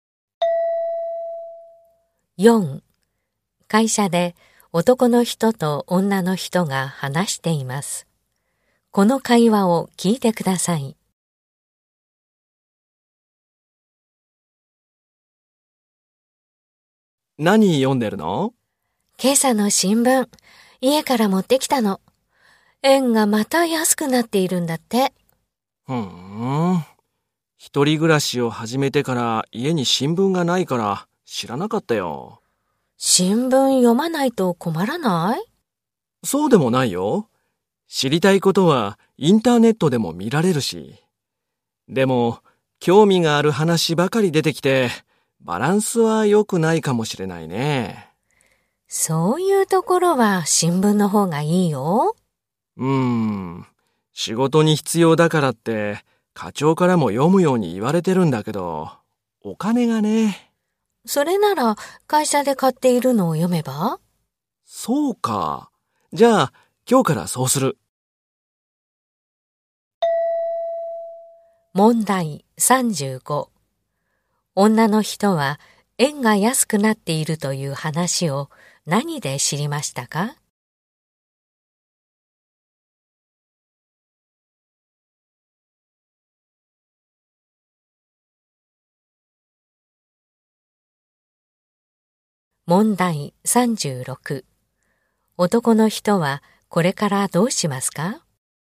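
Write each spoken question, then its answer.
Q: 女の人は円が安くなっているという話を何で知りましたか?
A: 新聞

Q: 男の人はこれからどうしますか?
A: 会社で買っている新聞を読む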